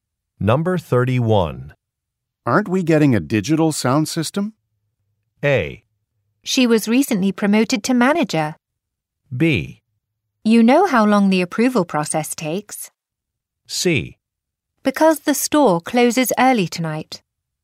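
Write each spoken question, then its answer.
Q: Aren't we getting a digital sound system?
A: B: You know how long the approval process takes.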